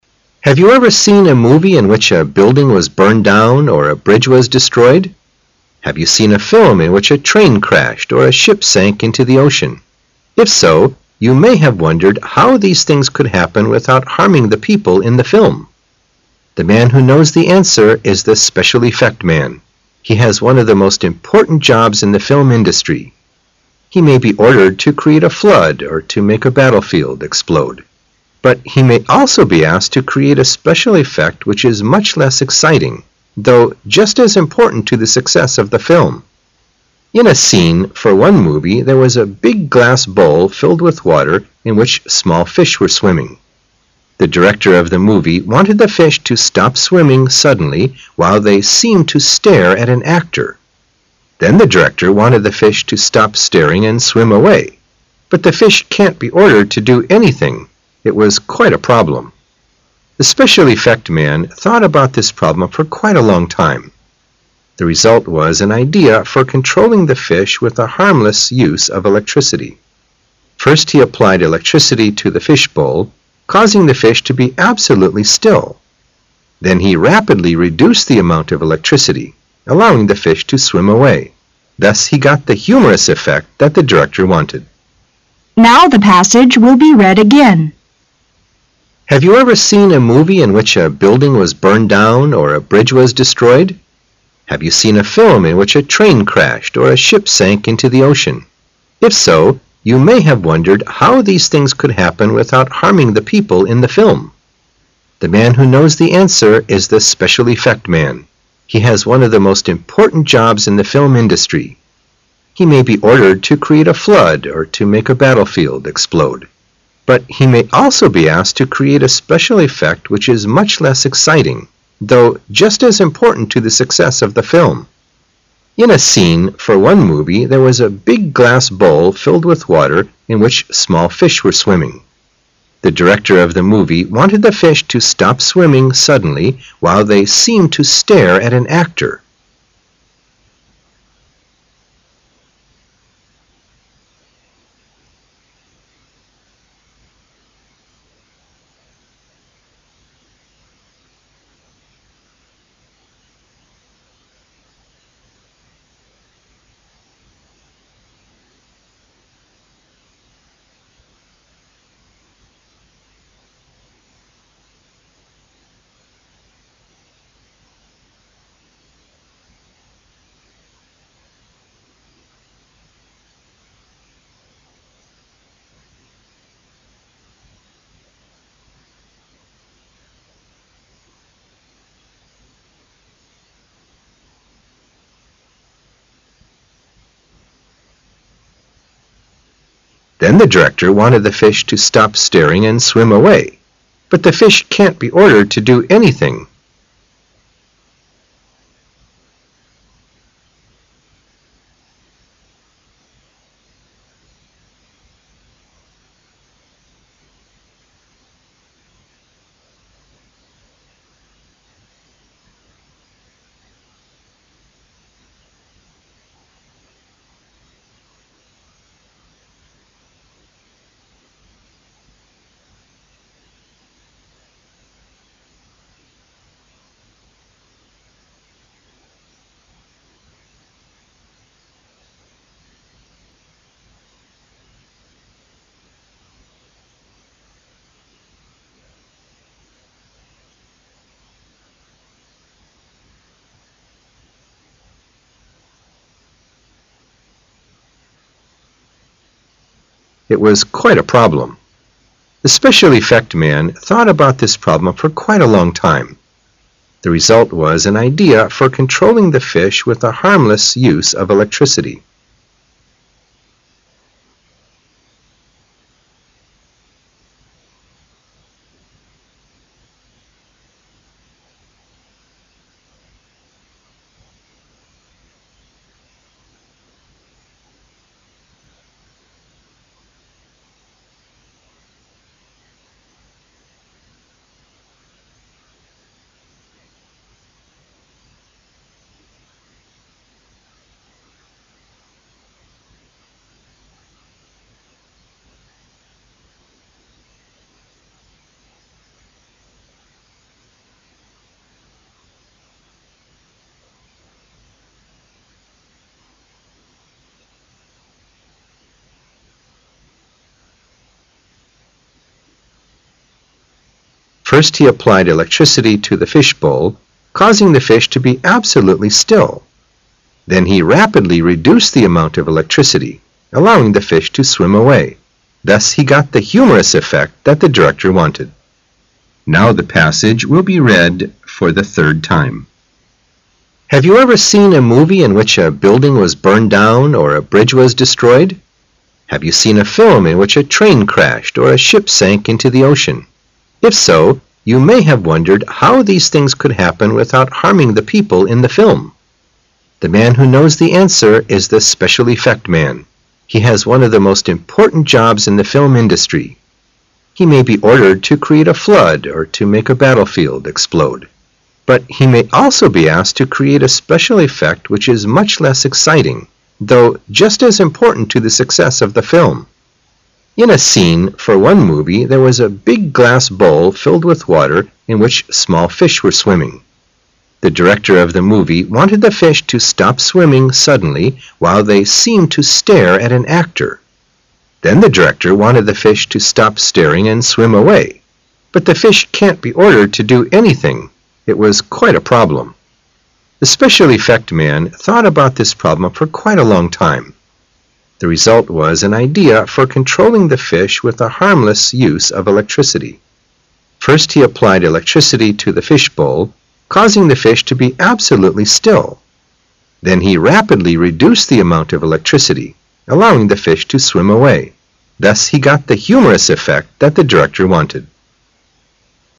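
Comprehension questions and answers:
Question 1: Have you ever seen a movie in which a building was burned down or a bridge was 1 ?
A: destroyed

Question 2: Have you seen a film in which a train 2 or a ship sank into the ocean?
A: crashed

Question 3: If so, you may have 3 how these things could happen without harming the people in the film.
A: wondered

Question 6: But he may also be asked to create a special effect which is much less exciting, 6 just as important to the success of the film.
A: though

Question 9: The director of the movie wanted the fish 9 .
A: to stop swimming suddenly while they seemed to stare at an actor

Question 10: 10 .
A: But the fish can't be ordered to do anything

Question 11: 11 .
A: The result was an idea for controlling the fish with a harmless use of electricity

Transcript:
[解析] 36-46 Have you ever seen a movie in which a building was burned down or a bridge was (36) destroyed? 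Have you seen a film in which a train (37) crashed or a ship sank into the ocean? If so, you may have (38) wondered how these things could happen without harming the people in the film. The man who knows the answer is the "special effect" man. He has one of the most important jobs in the film industry. He may be (39) ordered to create a flood or to make a battlefield (40) explode. But he may also be asked to create a special effect which is much less exciting, (41) though just as important to the success of the film. In a (42) scene for one movie there was a big glass (43) bowl filled with water in which small fish were swimming. The director of the movie wanted the fish (44) to stop swimming suddenly while they seemed to stare at an actor. Then the director wanted the fish to stop stating and swim away. (45) But the fish can't he ordered to do anything. It was quite a problem. The special effect man thought about this problem for quite a long time. 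(46) The result was an idea for controlling the fish with a harmless use of electricity. First he applied electricity to the fish bowl, musing the fish to be absolutely still. Then he rapidly reduced the amount of electricity, allowing the fish to swim away. Thus he got the humorous effect that the director wanted.
crashed
wondered
ordered
explode
though
scene
bowl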